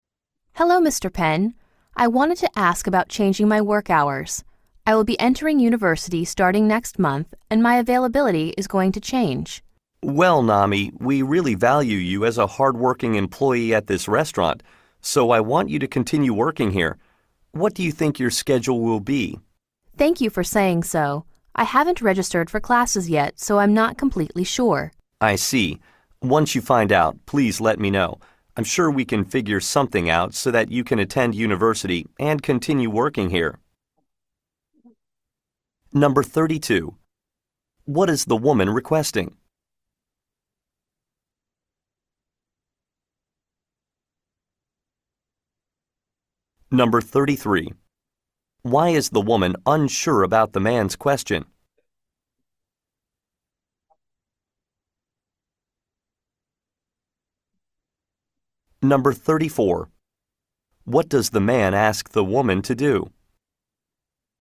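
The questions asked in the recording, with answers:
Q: What is the woman requesting?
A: To change her work hours

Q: Why is the woman unsure about the man's question?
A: She hasn't registered for classes yet

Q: What does the man ask the woman to do?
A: Let him know her schedule once she finds out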